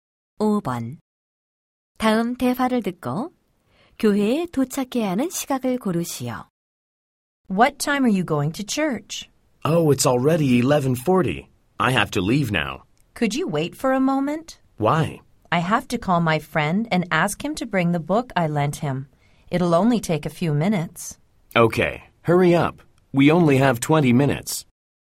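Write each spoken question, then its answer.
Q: 다음 대화를 듣고 교회에 도착해야 하는 시각을 고르시오.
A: 12시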